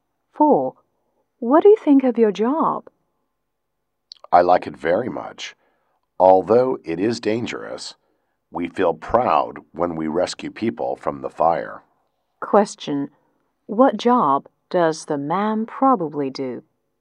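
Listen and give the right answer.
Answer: A firefighter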